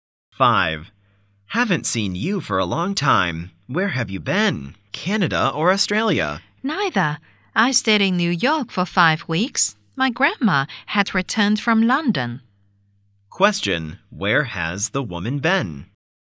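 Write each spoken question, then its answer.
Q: where has the woman been?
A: New York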